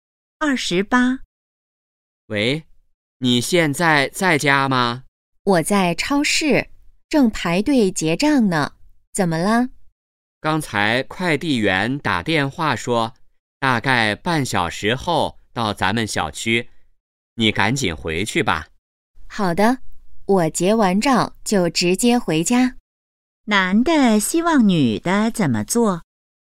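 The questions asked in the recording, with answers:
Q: 男的希望女的怎么做?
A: 赶紧回家收快递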